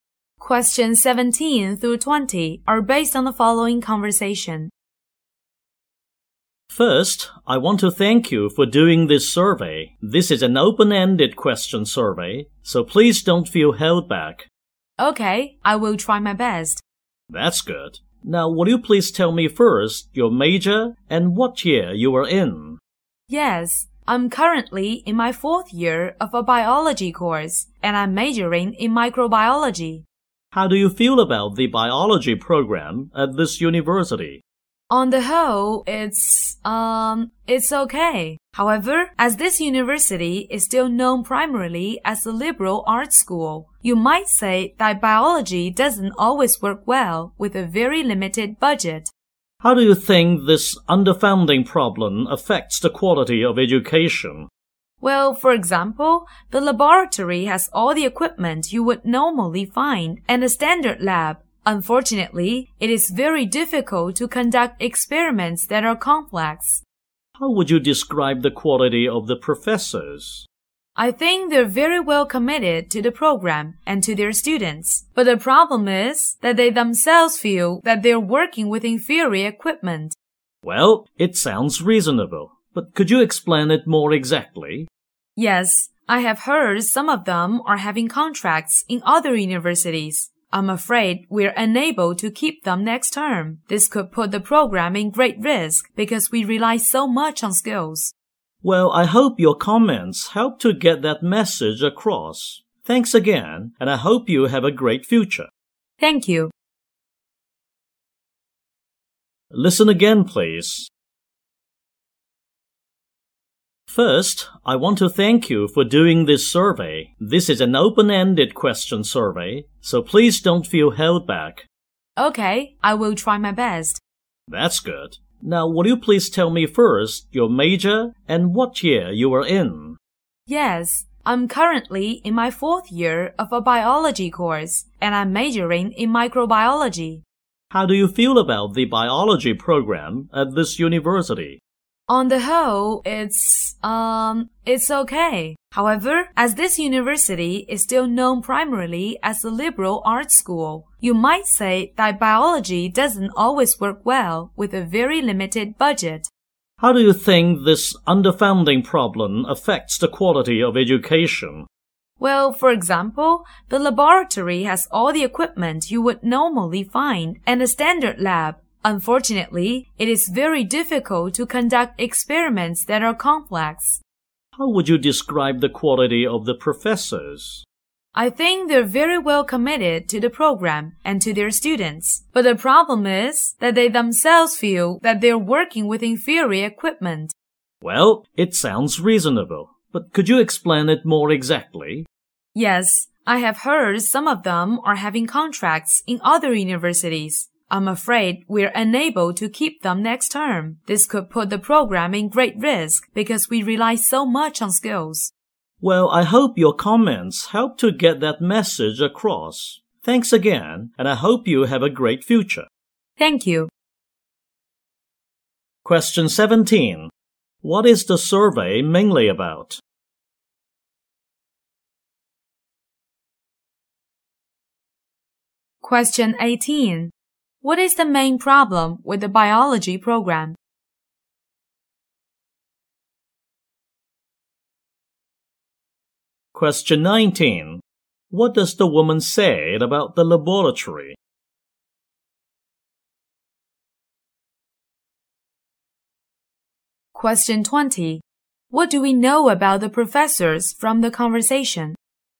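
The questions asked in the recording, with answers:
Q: What is the survey mainly about?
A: The university's biology program

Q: What is the main problem with the biology program?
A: A very limited budget (underfunding)

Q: What does the woman say about the laboratory?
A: It has standard equipment, but complex experiments are very hard to conduct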